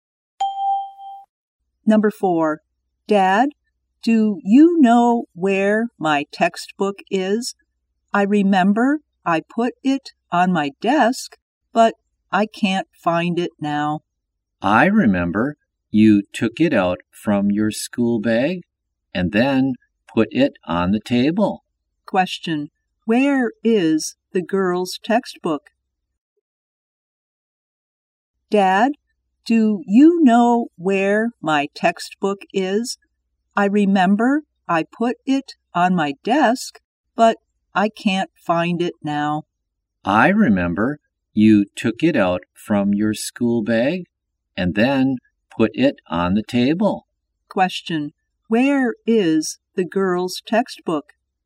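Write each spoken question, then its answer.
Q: Where is the girl's textbook?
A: On the table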